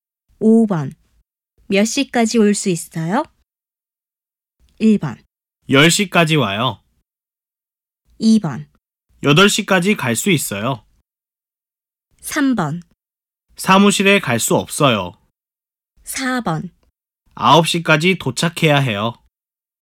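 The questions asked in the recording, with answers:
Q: 몇 시까지 올 수 있어요?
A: 2: 8시까지 갈 수 있어요.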